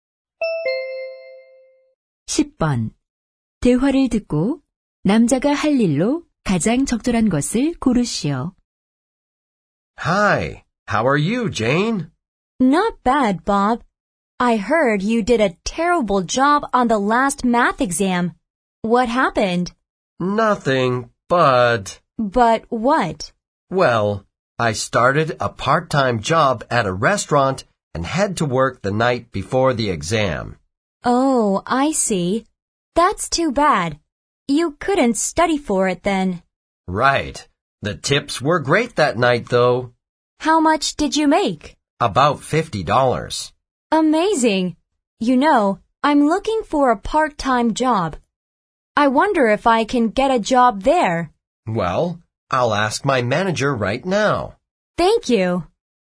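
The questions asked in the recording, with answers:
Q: 대화를 듣고 남자가 할 일로 가장 적절한 것을 고르시오.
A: 매니저에게 여자의 일자리에 대해 물어보기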